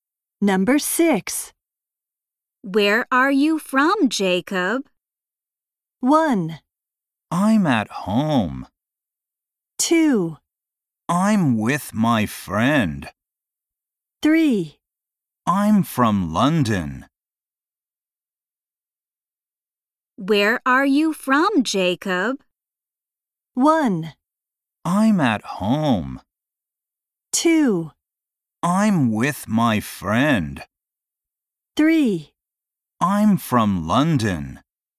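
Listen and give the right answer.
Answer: 3: I'm from London.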